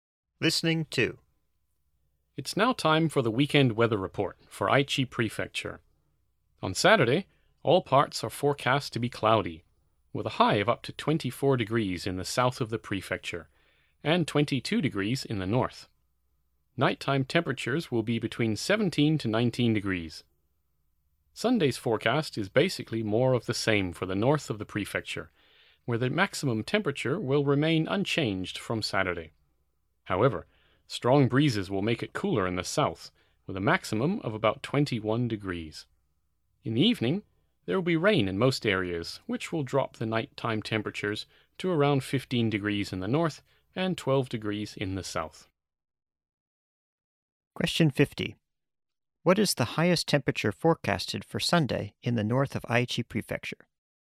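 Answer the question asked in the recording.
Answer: 22 degrees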